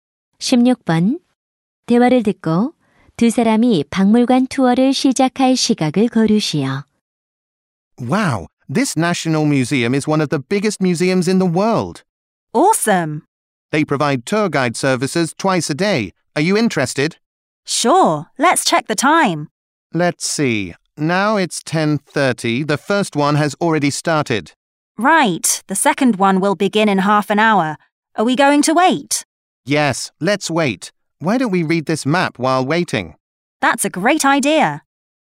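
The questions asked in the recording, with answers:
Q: 대화를 듣고 두 사람이 박물관 투어를 시작할 시각을 고르시오.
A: 11시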